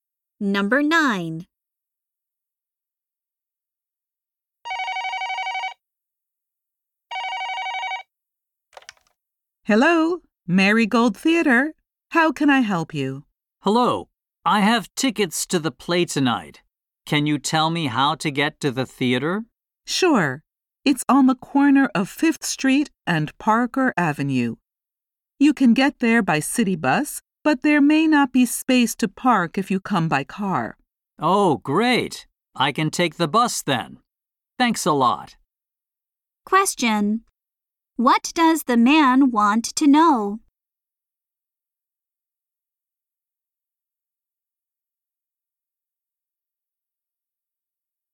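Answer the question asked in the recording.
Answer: How to get to the theater.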